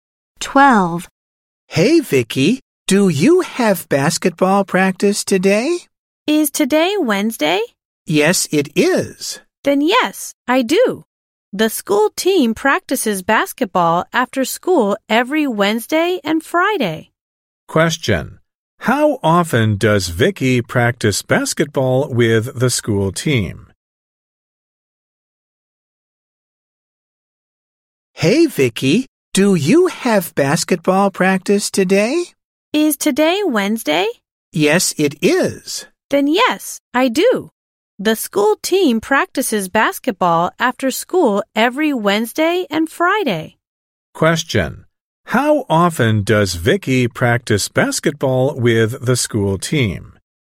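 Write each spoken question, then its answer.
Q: How often does Vicky practice basketball with the school team?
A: Twice a week (every Wednesday and Friday)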